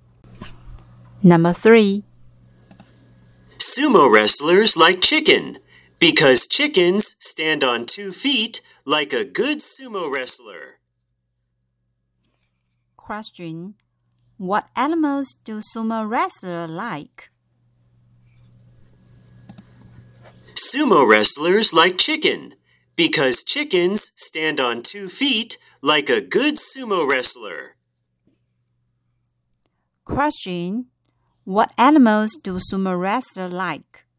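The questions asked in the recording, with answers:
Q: What animals do sumo wrestlers like?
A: Chickens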